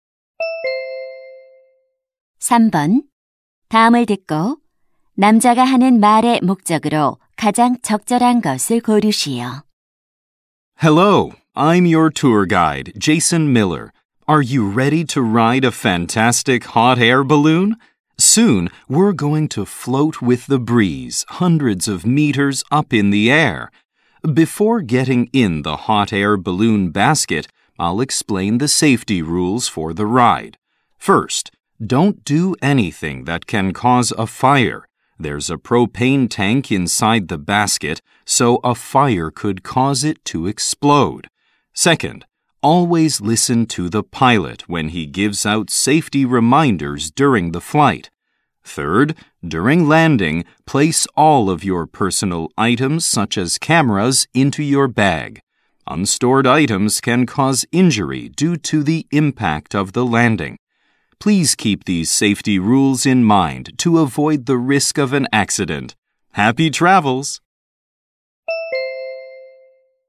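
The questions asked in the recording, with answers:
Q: 다음을 듣고 남자가 하는 말의 목적으로 가장 적절한 것을 고르시오.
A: 열기구 탑승 안전 수칙을 설명하려고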